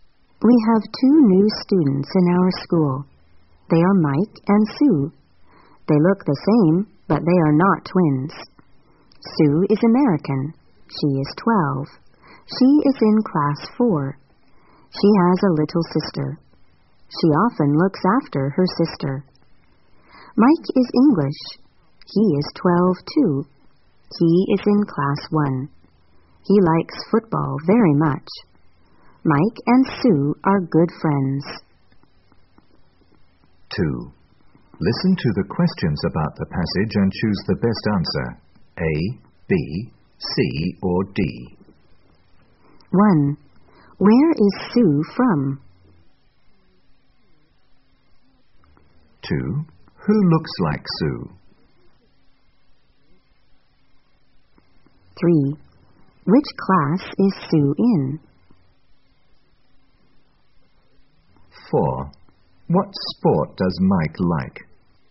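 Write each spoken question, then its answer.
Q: Where is Sue from?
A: America

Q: Who looks like Sue?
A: Mike

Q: Which class is Sue in?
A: Class 4

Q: What sport does Mike like?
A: Football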